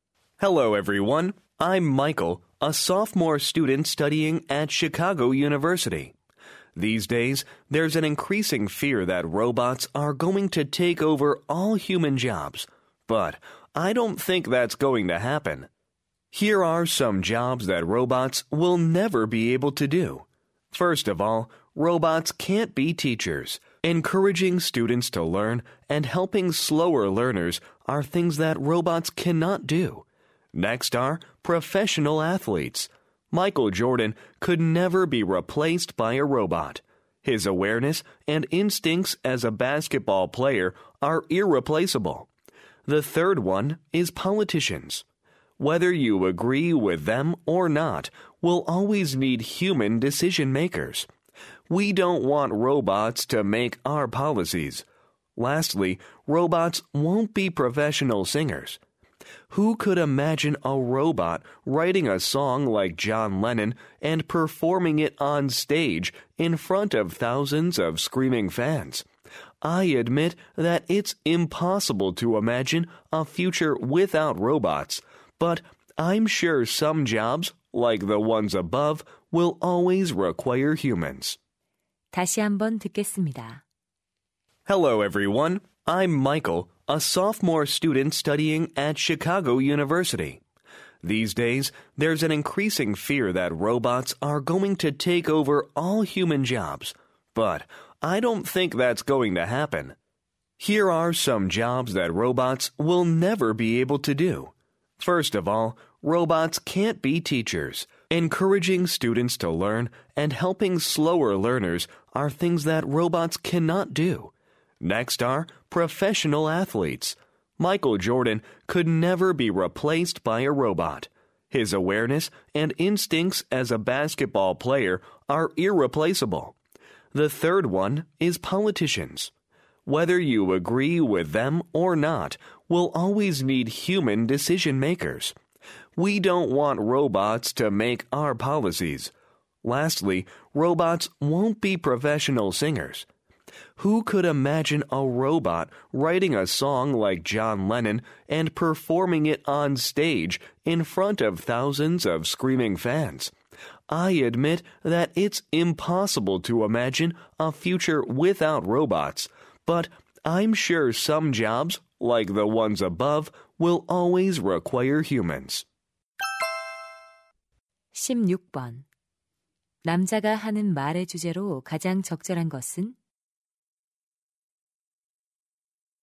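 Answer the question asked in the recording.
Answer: 로봇이 대체할 수 없는 직업들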